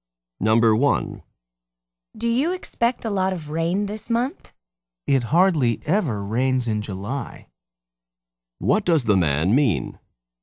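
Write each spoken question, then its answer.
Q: What does the man mean?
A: It almost never rains in July.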